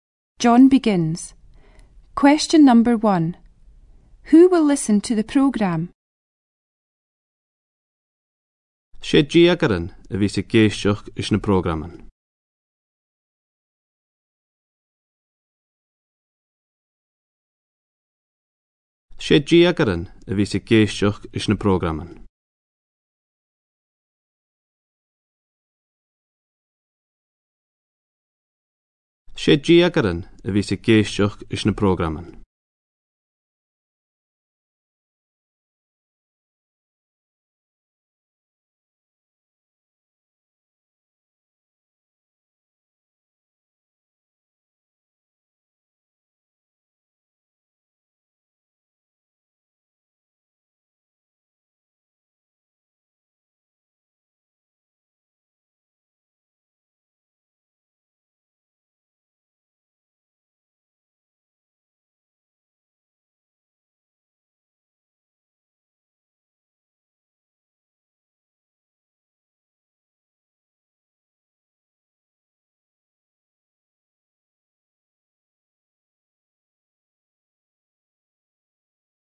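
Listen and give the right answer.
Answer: Teenagers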